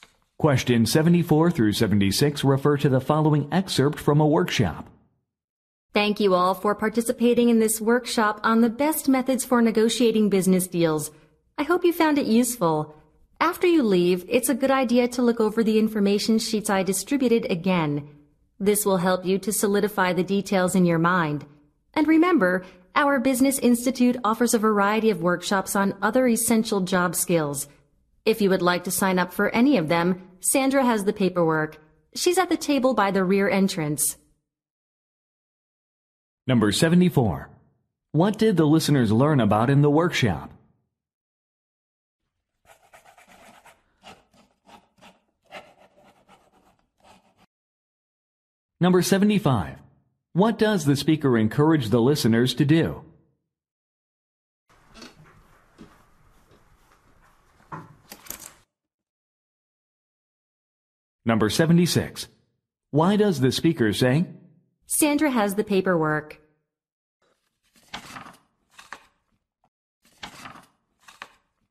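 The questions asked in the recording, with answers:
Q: What did the listeners learn about in the workshop?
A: Methods for negotiating business deals

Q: What does the speaker encourage the listeners to do?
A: Review the information sheets again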